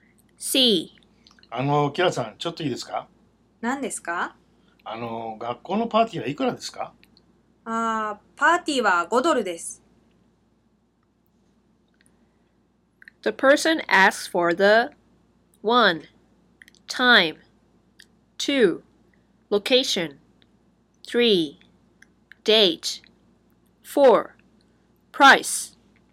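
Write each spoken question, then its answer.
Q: The person asks for the 1. Time 2. Location 3. Date 4. Price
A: 4: Price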